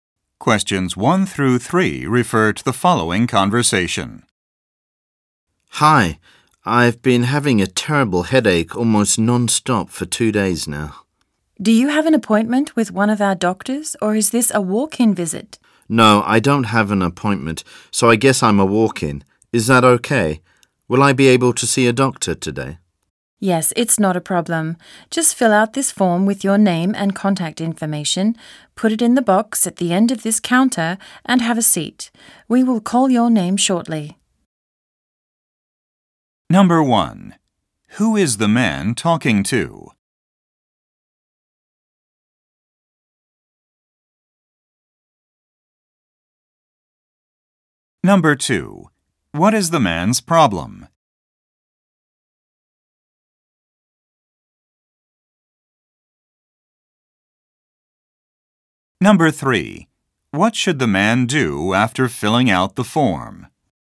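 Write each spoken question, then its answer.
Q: Who is the man talking to?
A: A receptionist at a doctor's office

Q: What is the man's problem?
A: He has had a headache for 2 days

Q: What should the man do after filling out the form?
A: Put it in the box at the end of the counter and have a seat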